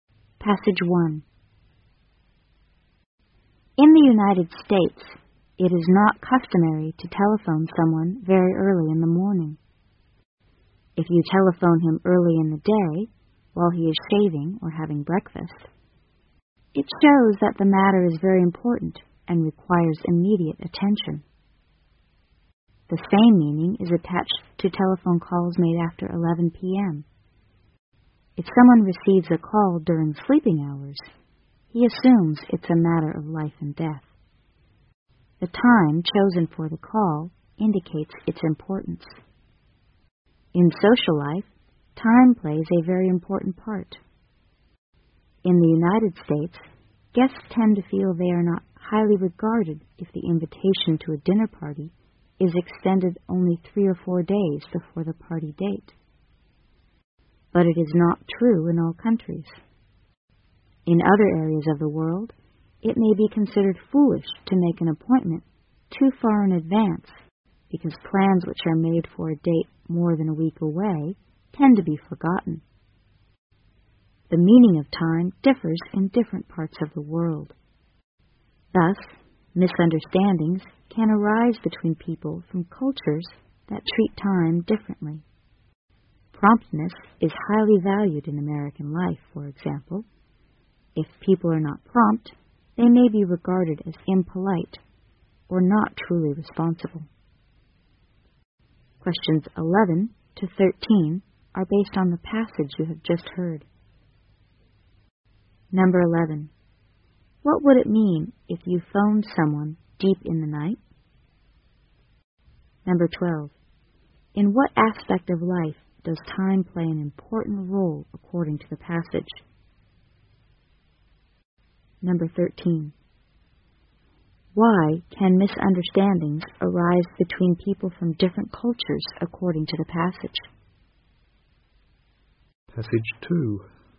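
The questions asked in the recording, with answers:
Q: What would it mean if you phoned someone deep in the night?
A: It's a matter of life and death

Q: In what aspect of life does time play an important role according to the passage?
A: Social life

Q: Why can misunderstandings arise between people from different cultures according to the passage?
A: Their cultures treat time differently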